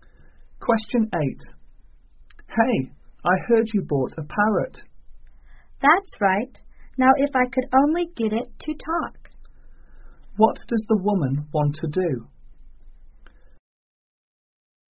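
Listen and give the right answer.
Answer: Teach her parrot to talk.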